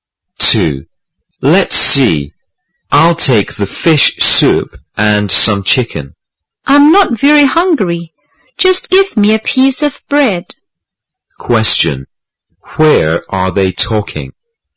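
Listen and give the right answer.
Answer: In a restaurant.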